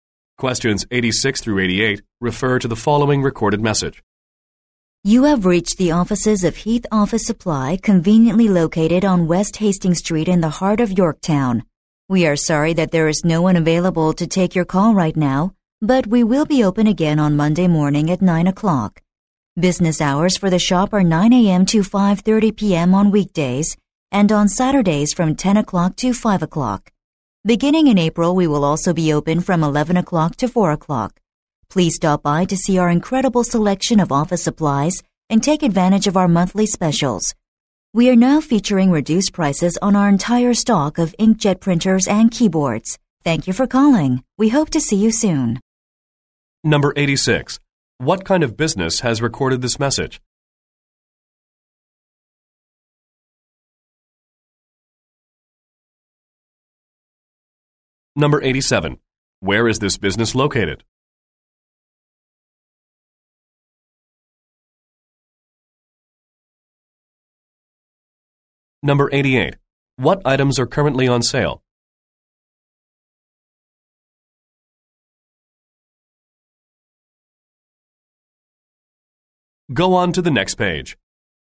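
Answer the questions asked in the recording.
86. An office supply store
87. On West Hastings Street in Yorktown
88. Inkjet printers and keyboards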